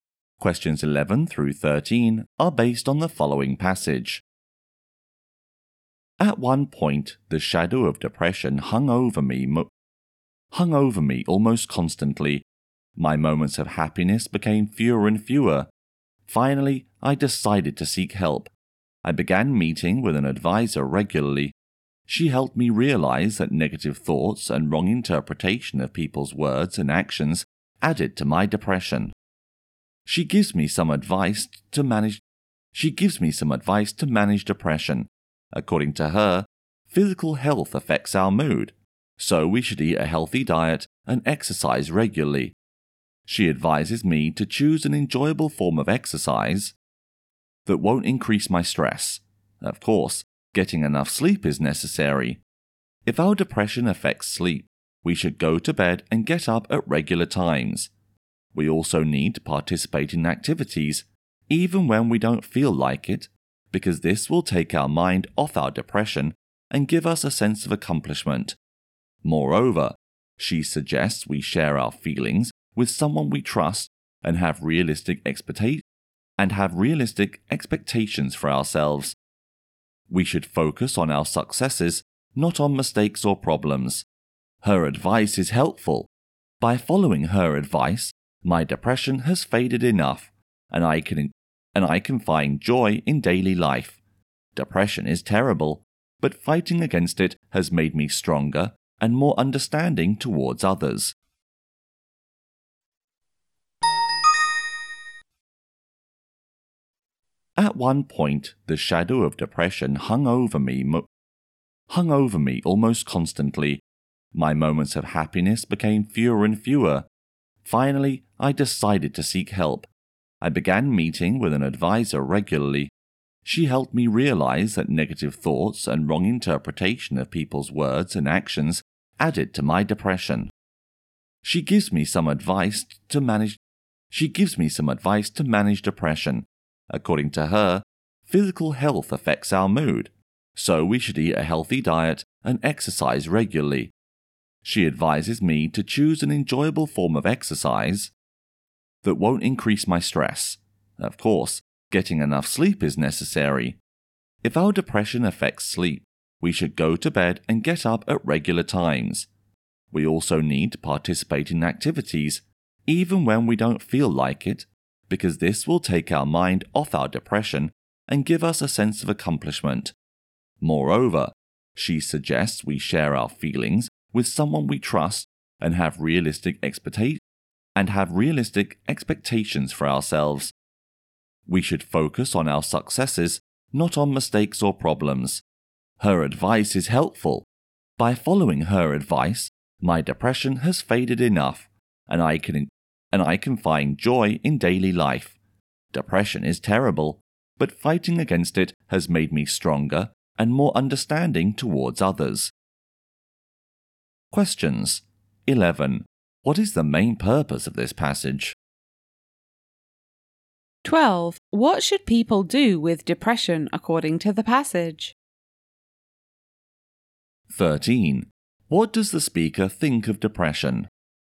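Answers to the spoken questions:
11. To share advice on how to manage depression
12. Eat healthily, exercise, get enough sleep, take part in activities and share their feelings
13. It is terrible, but fighting it made him stronger and more understanding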